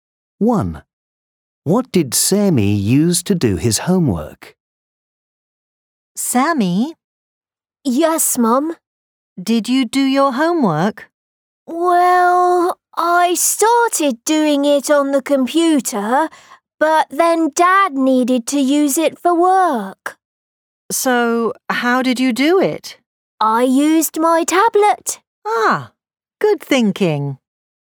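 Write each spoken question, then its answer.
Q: What did Sammy use to do his homework?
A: His tablet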